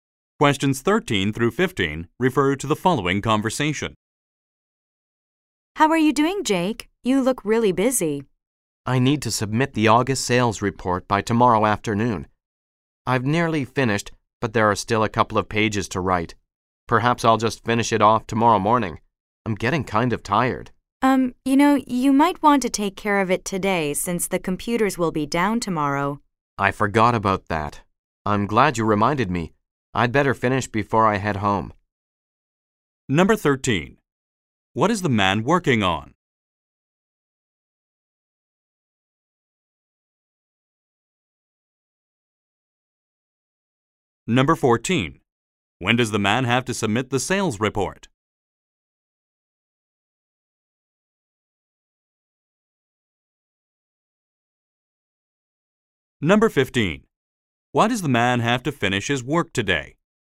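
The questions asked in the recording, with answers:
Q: What is the man working on?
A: The August sales report

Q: When does the man have to submit the sales report?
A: Tomorrow afternoon

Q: Why does the man have to finish his work today?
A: The computers will be down tomorrow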